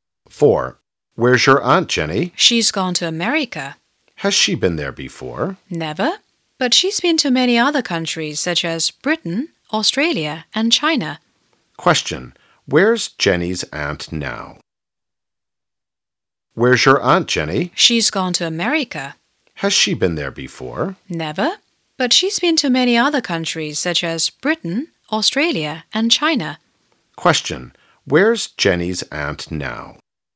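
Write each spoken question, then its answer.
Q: Where's Jenny's aunt now?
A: In America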